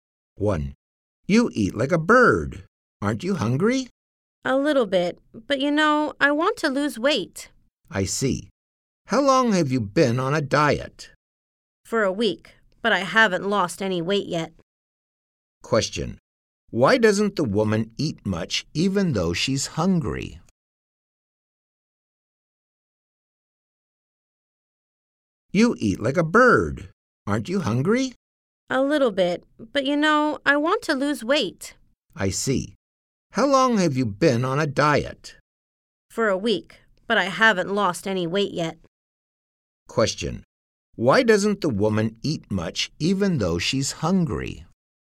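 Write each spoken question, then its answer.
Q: Why doesn't the woman eat much even though she's hungry?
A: She wants to lose weight.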